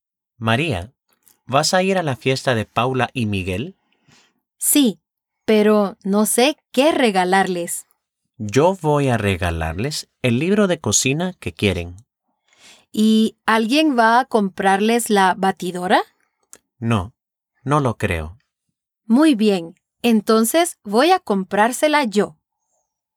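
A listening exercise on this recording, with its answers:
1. ¿Qué les va a regalar Juan a Paula y Miguel?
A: El libro de cocina que quieren.

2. ¿Quién les va a regalar la batidora?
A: María.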